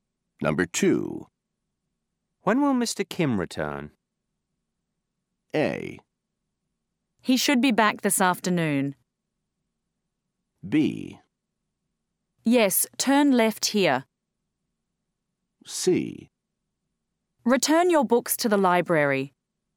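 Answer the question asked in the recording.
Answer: A: He should be back this afternoon.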